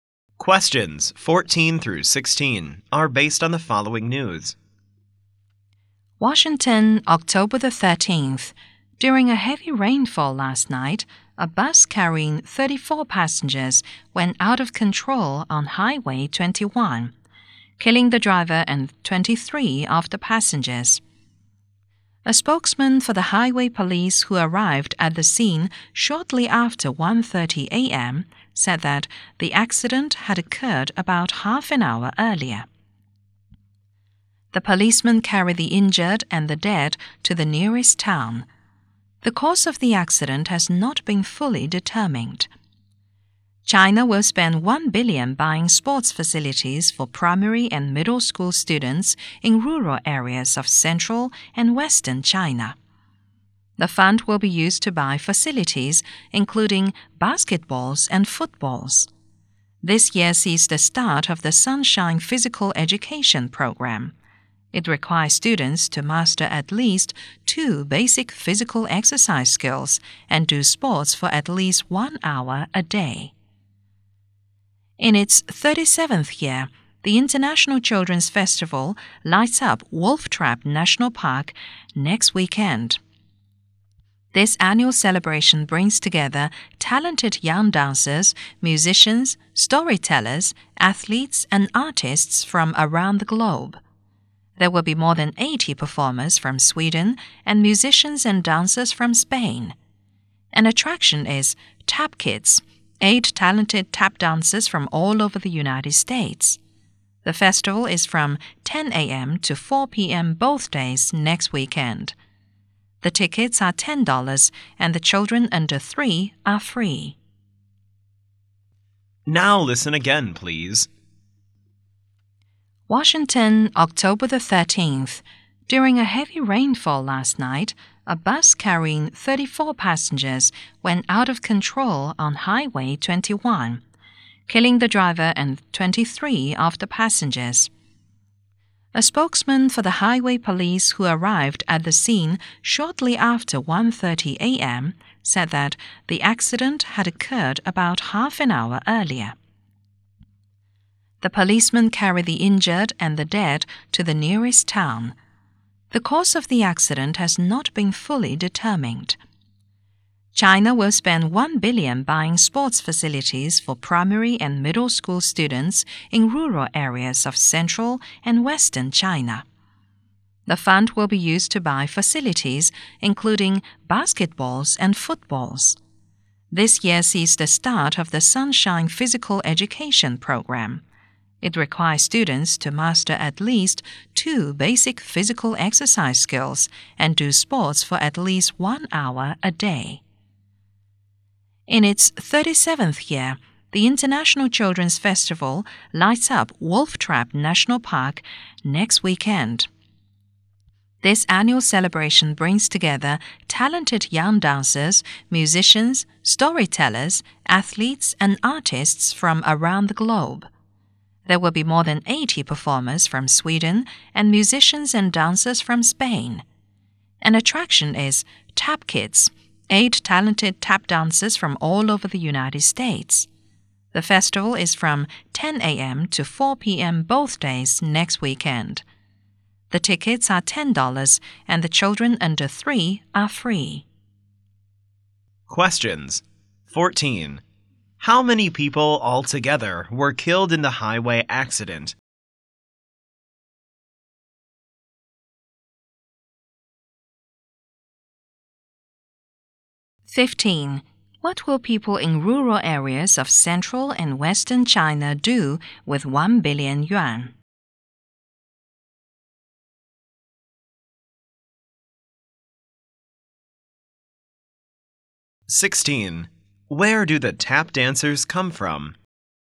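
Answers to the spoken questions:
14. 24
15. Buy sports facilities for primary and middle school students
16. All over the United States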